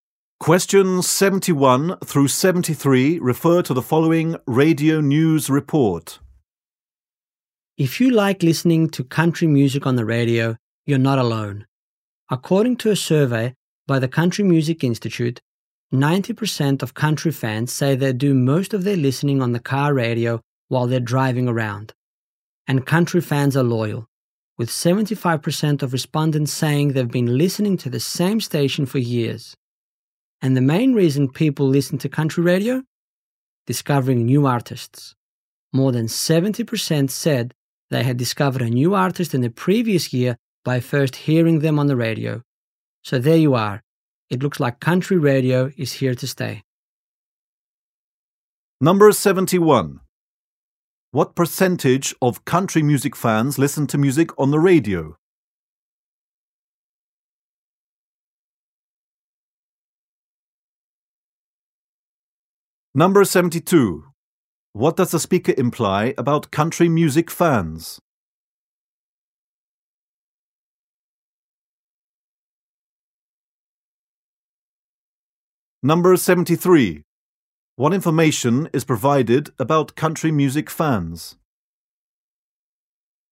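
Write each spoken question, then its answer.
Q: What percentage of country music fans listen to music on the radio?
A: 90% (mostly on the car radio)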